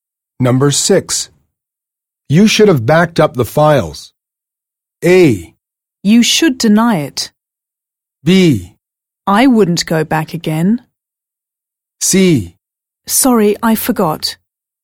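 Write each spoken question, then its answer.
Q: You should have backed up the files.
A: C: Sorry, I forgot.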